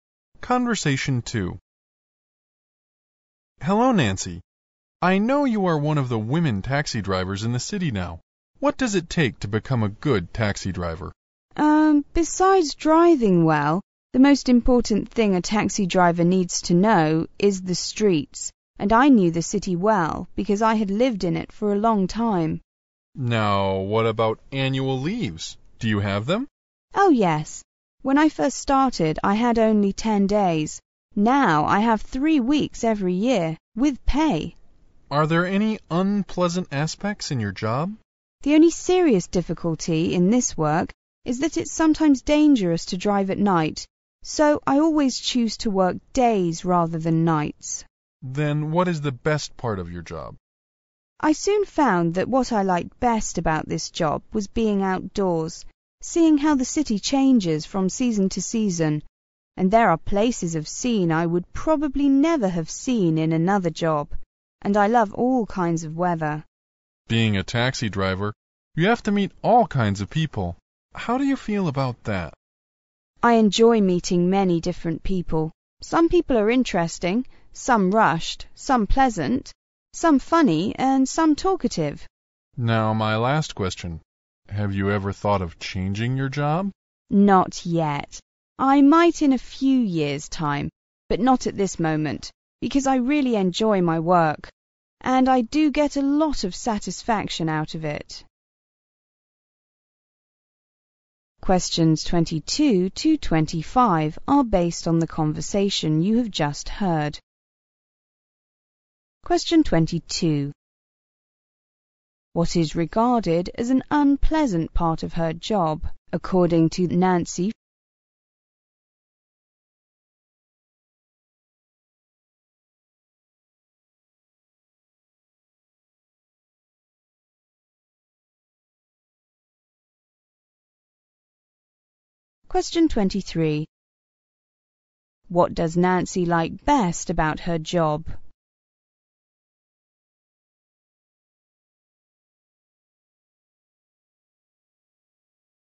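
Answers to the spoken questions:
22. It's sometimes dangerous to drive at night
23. Being outdoors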